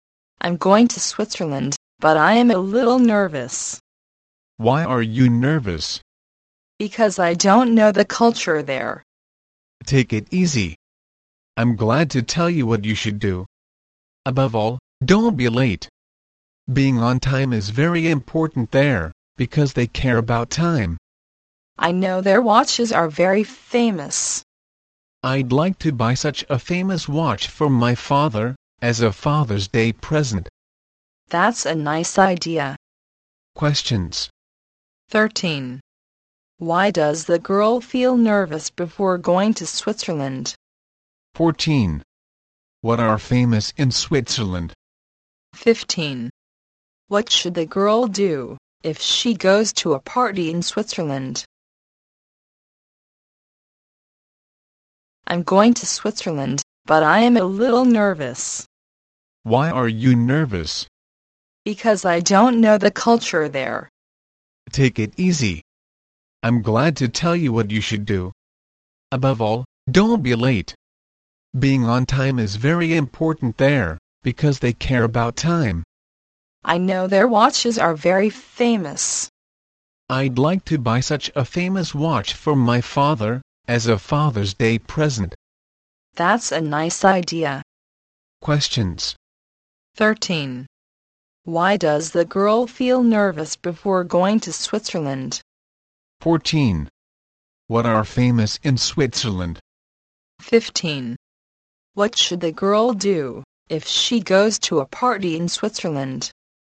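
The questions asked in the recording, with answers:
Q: 13. Why does the girl feel nervous before going to Switzerland?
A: She doesn't know the culture there

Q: 14. What are famous in Switzerland?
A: Watches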